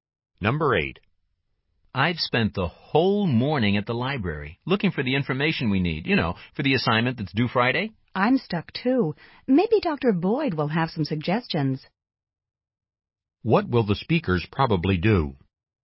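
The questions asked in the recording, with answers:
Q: What will the speakers probably do?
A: Ask Dr. Boyd for suggestions.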